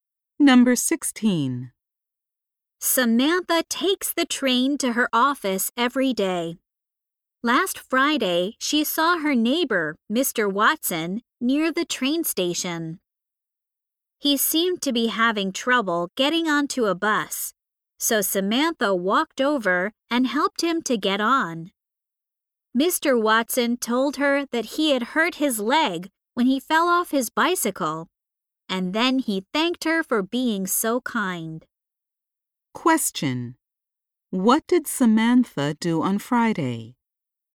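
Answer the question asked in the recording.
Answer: She helped her neighbor Mr. Watson get onto a bus.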